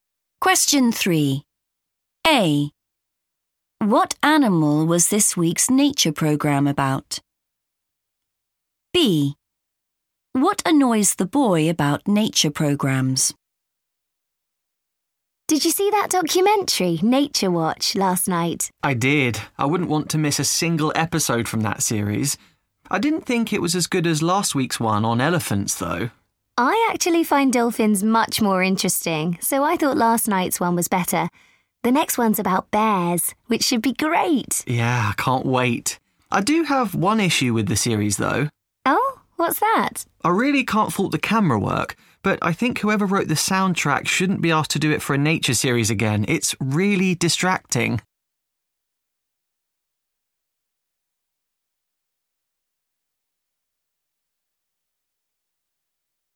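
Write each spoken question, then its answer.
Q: What animal was this week's nature programme about?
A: dolphins

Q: What annoys the boy about nature programs?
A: the soundtrack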